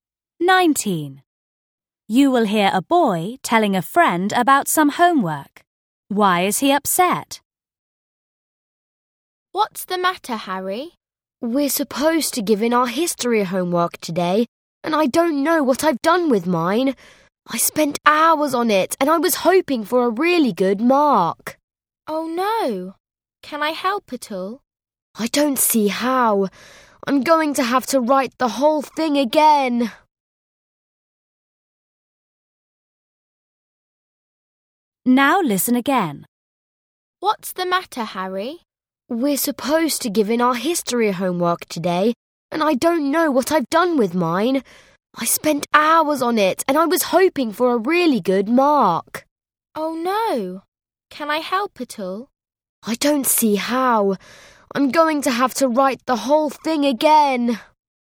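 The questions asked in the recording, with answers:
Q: Why is he upset?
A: He has lost his history homework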